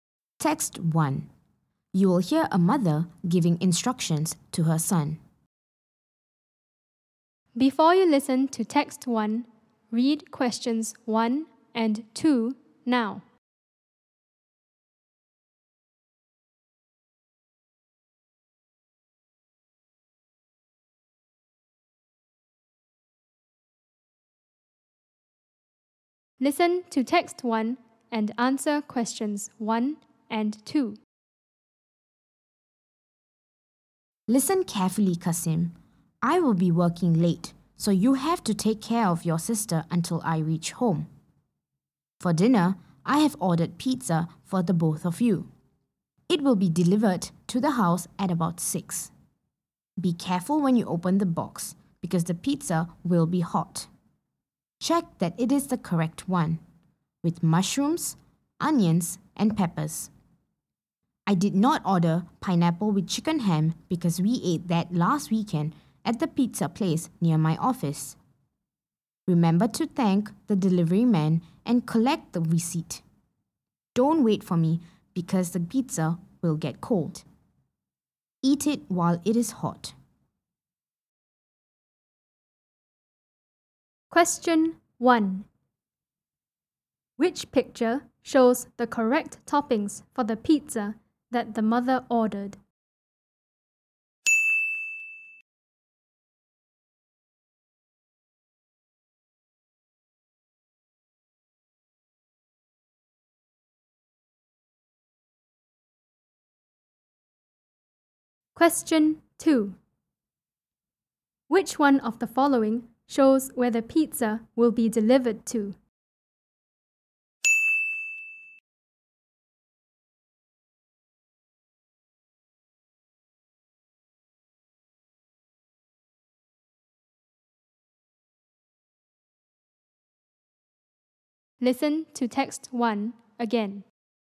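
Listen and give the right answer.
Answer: To the house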